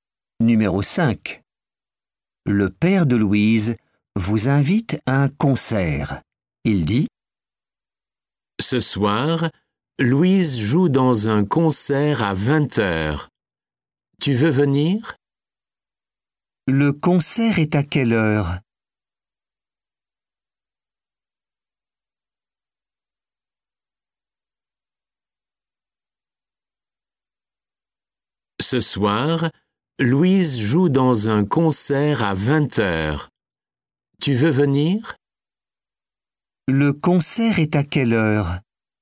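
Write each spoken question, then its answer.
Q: Le concert est à quelle heure?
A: à 20h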